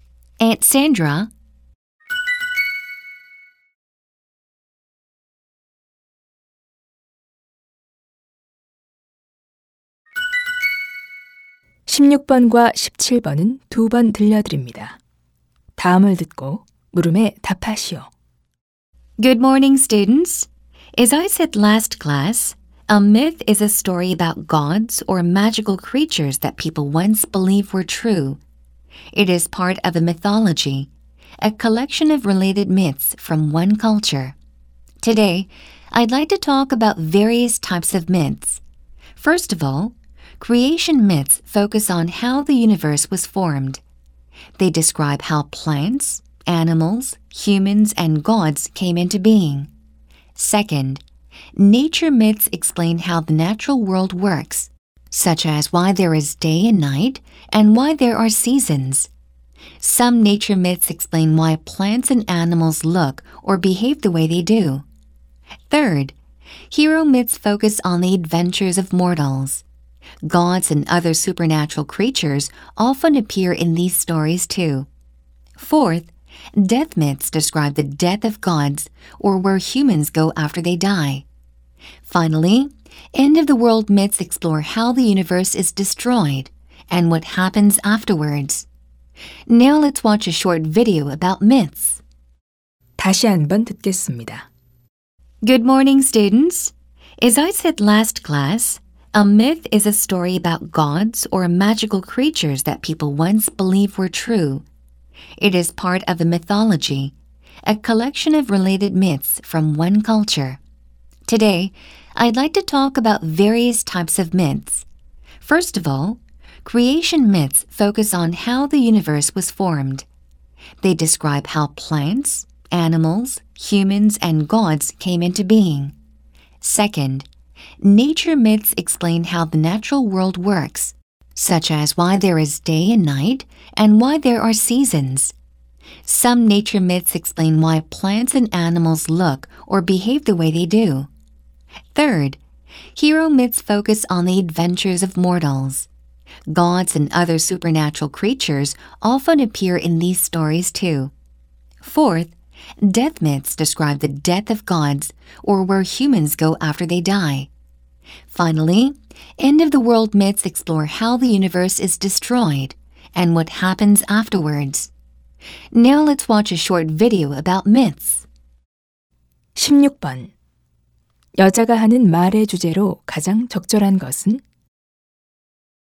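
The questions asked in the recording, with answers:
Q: 16번 여자가 하는 말의 주제로 가장 적절한 것은?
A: 신화의 다양한 유형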